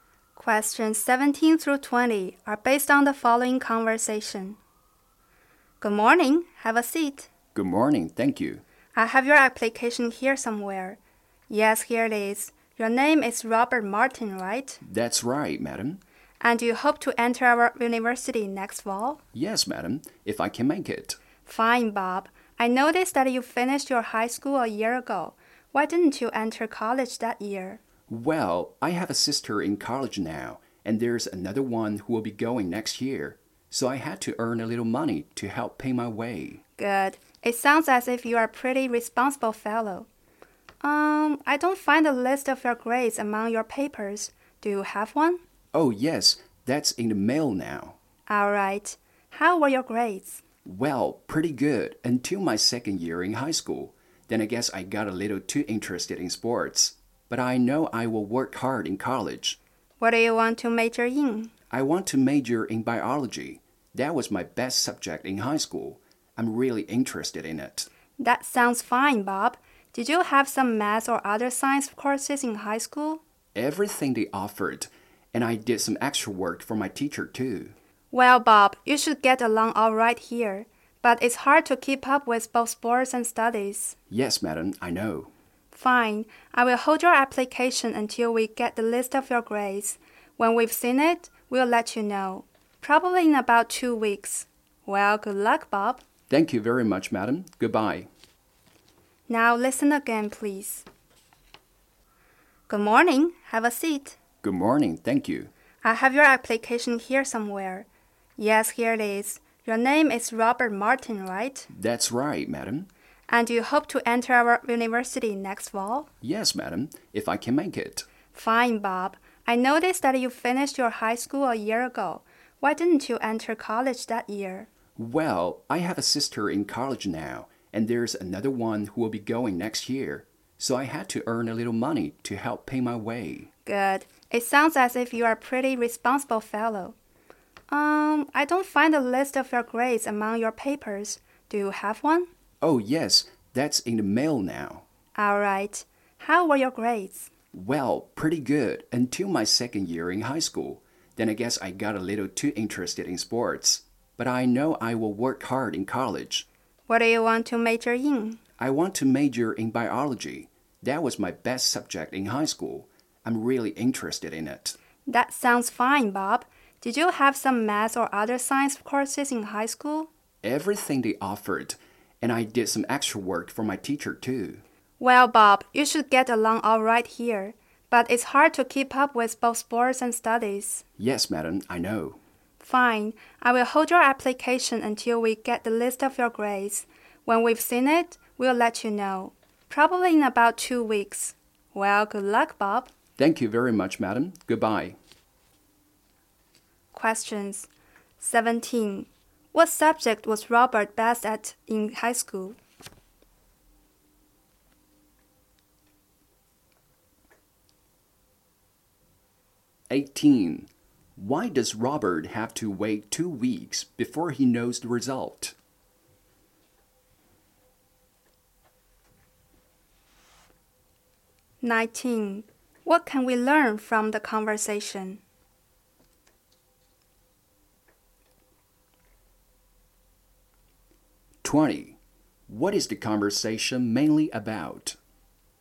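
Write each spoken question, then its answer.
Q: What subject was Robert best at in high school?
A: Biology

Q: Why does Robert have to wait 2 weeks before he knows the result?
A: The list of his grades hasn't arrived yet

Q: What is the conversation mainly about?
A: A university admission interview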